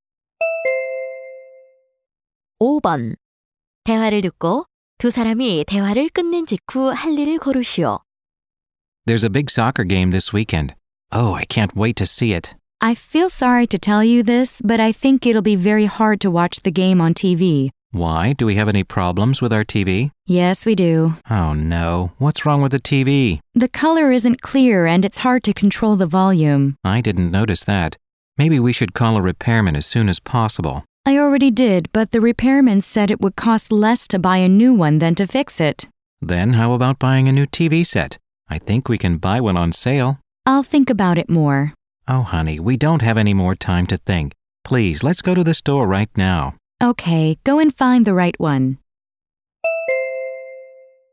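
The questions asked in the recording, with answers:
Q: 대화를 듣고 두 사람이 대화를 끝낸 직후 할 일을 고르시오.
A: 새 TV를 사러 가게에 간다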